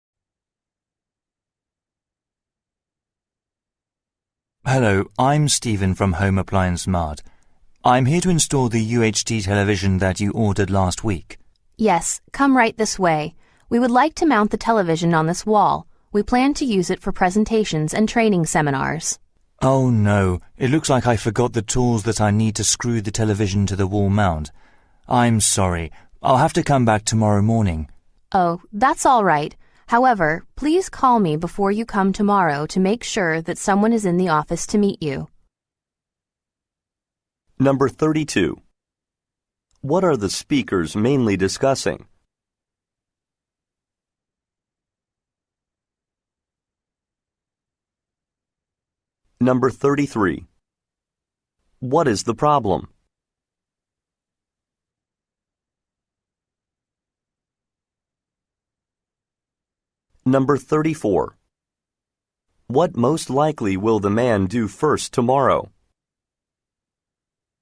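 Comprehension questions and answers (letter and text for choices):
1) What are the speakers mainly discussing?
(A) A training seminar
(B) The installation of a television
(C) The date of a presentation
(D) A software upgrade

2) What is the problem?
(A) The necessary tools are unavailable.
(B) The office is closed.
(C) The wall is too weak.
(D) The phone number was wrong.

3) What most likely will the man do first tomorrow?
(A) Order a replacement part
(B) Consult an instruction manual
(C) Contact the woman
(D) Fill out a work order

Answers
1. (B) The installation of a television
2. (A) The necessary tools are unavailable.
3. (C) Contact the woman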